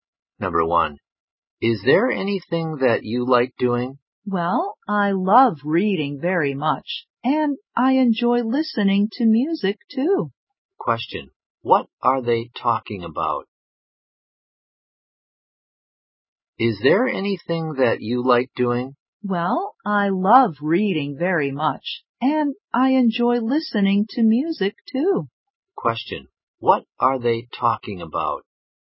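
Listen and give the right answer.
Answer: Hobbies (things they like doing)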